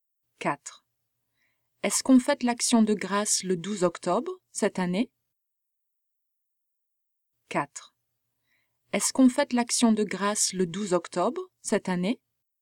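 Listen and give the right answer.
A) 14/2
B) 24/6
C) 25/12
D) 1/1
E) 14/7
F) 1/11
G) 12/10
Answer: G) 12/10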